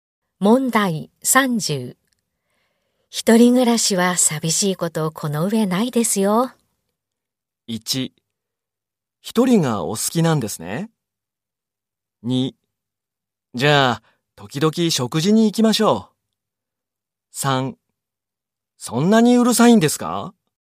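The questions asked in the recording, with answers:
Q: 一人暮らしは寂しいことこの上ないですよ。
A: 2: じゃあ、時々食事に行きましょう。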